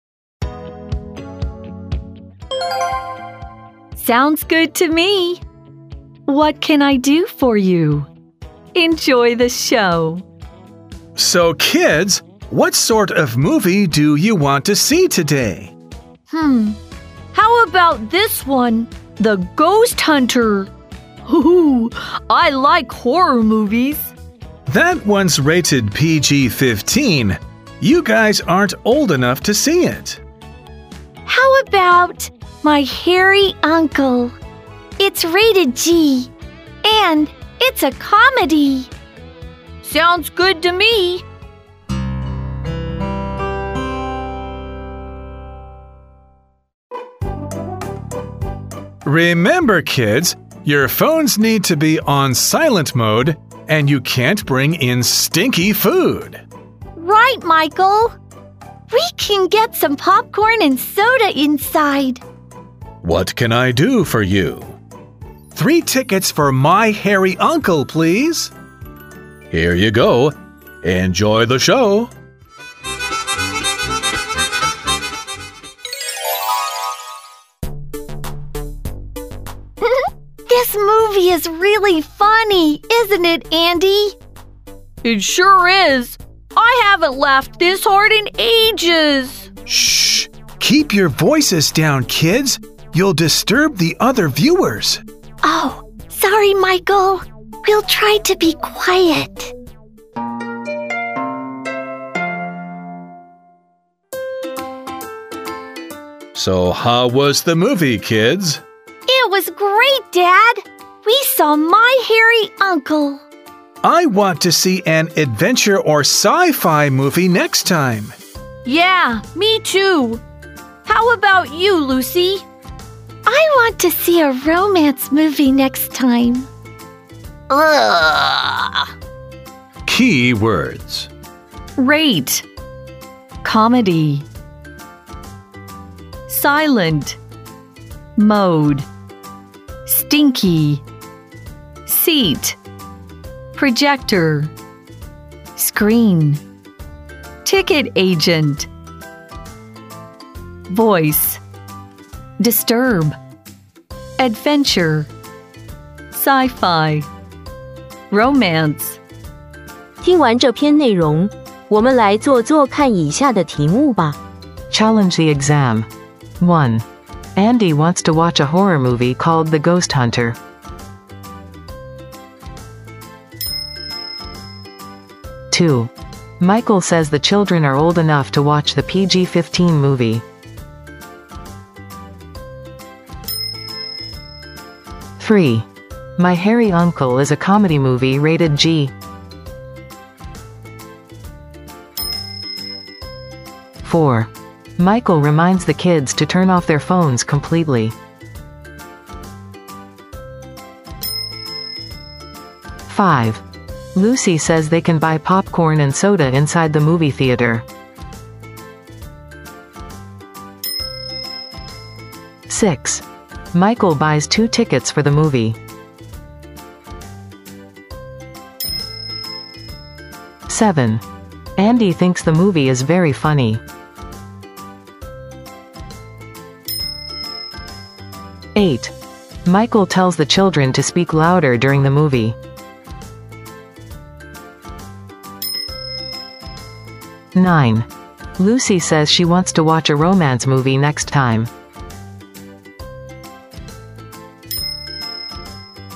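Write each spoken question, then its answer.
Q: Michael says the children are old enough to watch the PG-15 movie.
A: False

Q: My Hairy Uncle is a comedy movie rated G.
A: True

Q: Michael reminds the kids to turn off their phones completely.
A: False

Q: Michael buys 2 tickets for the movie.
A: False

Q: Andy thinks the movie is very funny.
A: True

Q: Michael tells the children to speak louder during the movie.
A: False

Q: Lucy says she wants to watch a romance movie next time.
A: True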